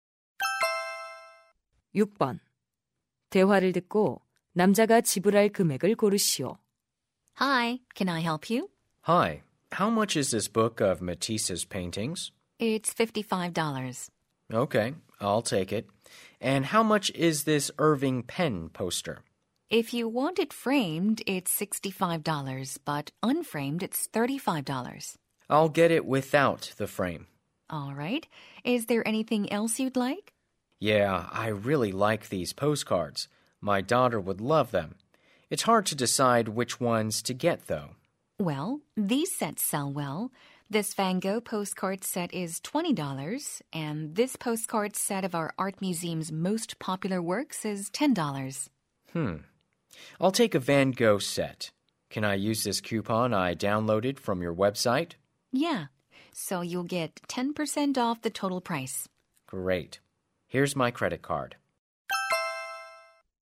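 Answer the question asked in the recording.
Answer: $99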